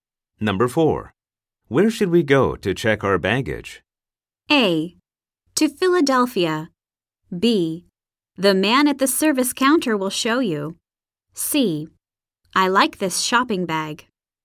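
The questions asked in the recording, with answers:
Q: Where should we go to check our baggage?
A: B: The man at the service counter will show you.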